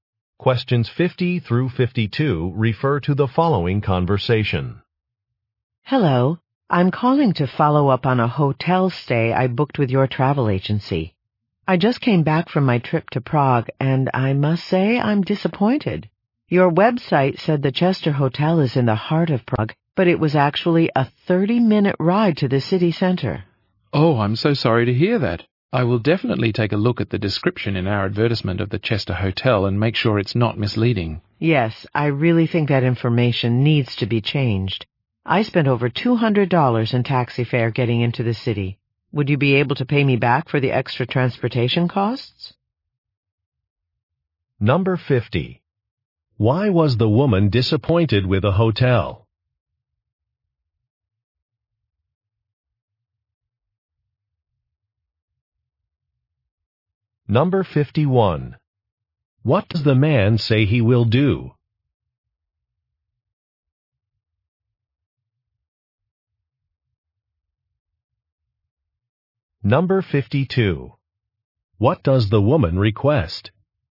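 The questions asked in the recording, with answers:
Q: Why was the woman disappointed with a hotel?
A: It was far from the city center

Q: What does the man say he will do?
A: Check the hotel description in the advertisement

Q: What does the woman request?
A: Reimbursement for transportation costs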